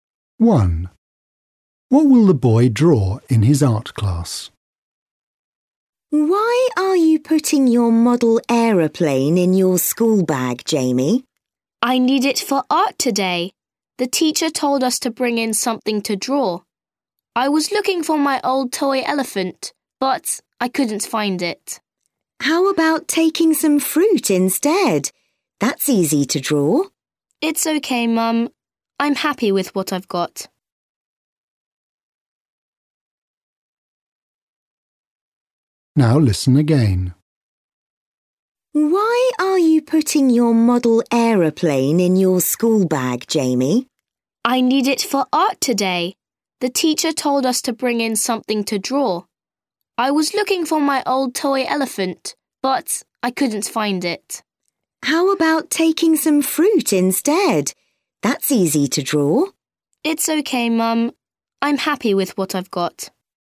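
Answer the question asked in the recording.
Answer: his model aeroplane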